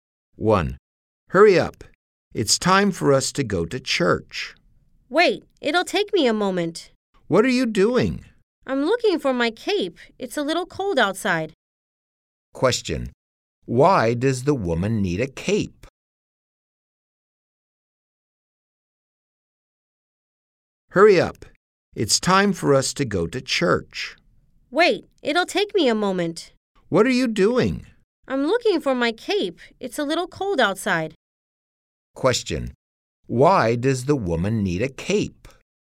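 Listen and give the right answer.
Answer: Because it's a little cold outside.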